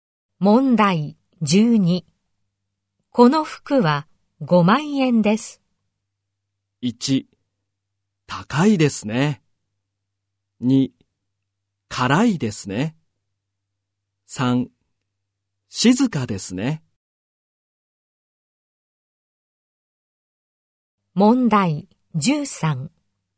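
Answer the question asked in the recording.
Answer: 1: 高いですね。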